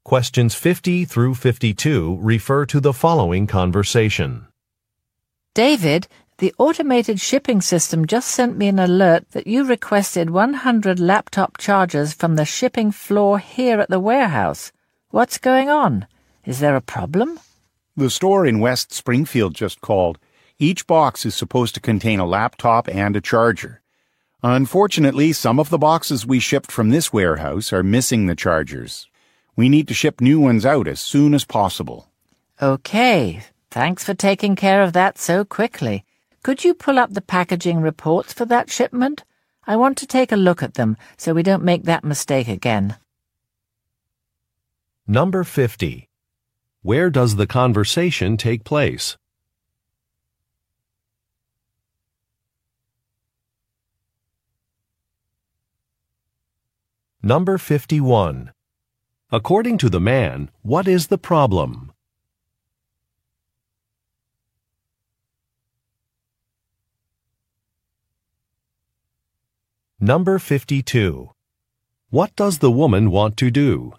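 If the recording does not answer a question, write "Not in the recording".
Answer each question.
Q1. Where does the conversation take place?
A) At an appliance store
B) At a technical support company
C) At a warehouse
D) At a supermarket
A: C) At a warehouse

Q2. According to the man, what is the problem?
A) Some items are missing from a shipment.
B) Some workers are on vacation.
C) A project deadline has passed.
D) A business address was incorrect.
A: A) Some items are missing from a shipment.

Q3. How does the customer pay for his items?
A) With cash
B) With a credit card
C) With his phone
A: Not in the recording

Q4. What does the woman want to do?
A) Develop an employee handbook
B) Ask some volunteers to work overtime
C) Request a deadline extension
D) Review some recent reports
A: D) Review some recent reports

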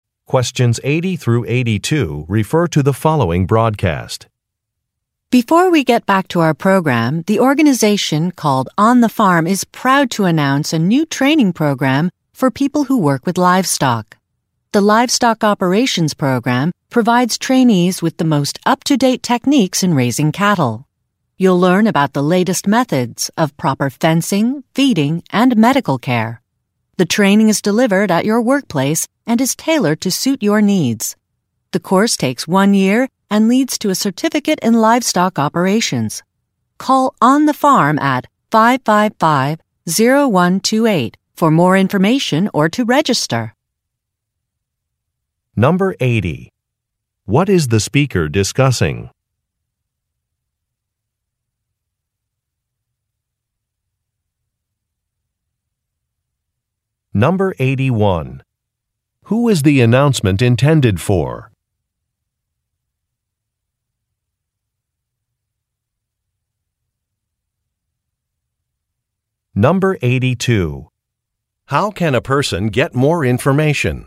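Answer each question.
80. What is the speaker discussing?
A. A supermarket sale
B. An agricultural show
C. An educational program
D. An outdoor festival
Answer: C. An educational program

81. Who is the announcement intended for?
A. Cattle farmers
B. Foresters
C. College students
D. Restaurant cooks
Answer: A. Cattle farmers

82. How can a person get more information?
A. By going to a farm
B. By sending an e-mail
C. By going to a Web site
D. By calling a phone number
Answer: D. By calling a phone number

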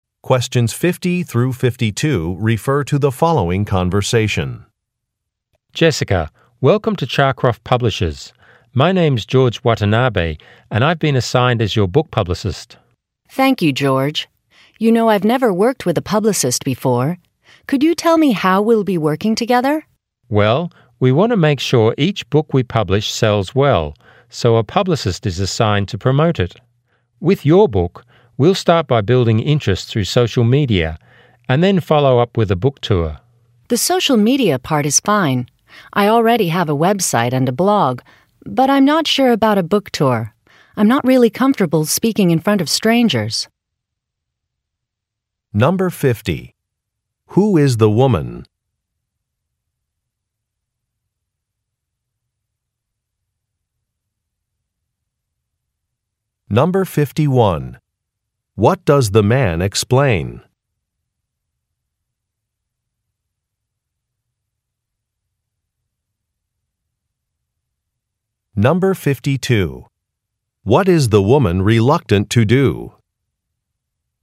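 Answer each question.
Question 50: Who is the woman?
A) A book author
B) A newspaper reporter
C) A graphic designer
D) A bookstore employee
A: A) A book author

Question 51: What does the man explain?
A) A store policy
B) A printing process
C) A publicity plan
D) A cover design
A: C) A publicity plan

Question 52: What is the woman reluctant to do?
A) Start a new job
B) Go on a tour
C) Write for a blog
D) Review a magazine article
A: B) Go on a tour

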